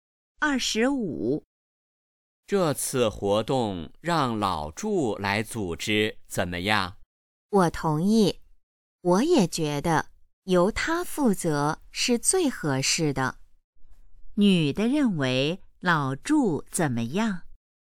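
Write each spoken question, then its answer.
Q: 女的认为老祝怎么样?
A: 由他负责最合适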